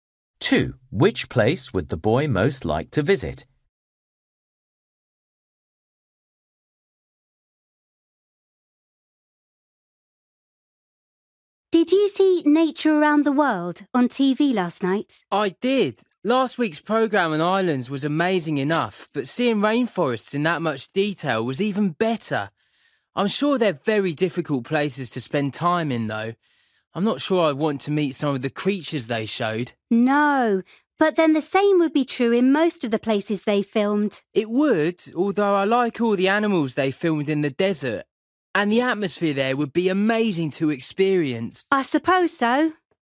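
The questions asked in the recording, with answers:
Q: Which place would the boy most like to visit?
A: The desert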